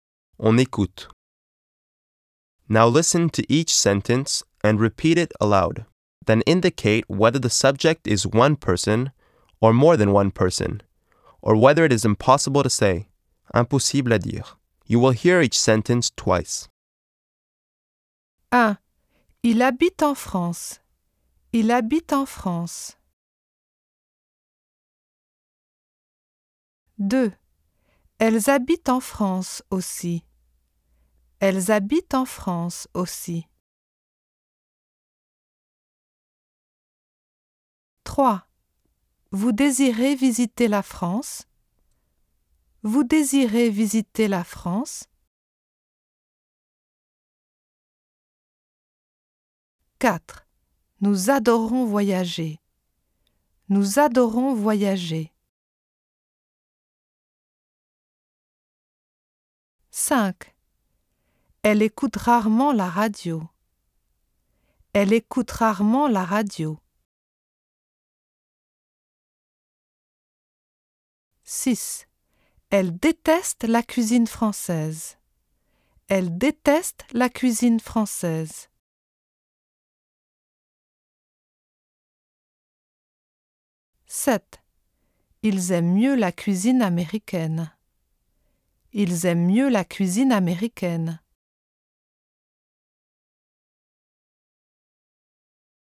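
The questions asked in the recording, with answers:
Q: Il habite en France.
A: one person

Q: Elles habitent en France aussi.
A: more than one person

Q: Vous désirez visiter la France?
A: impossible à dire

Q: Nous adorons voyager.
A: more than one person

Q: Elle écoute rarement la radio.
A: one person

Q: Elle déteste la cuisine française.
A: impossible à dire

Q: Ils aiment mieux la cuisine américaine.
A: more than one person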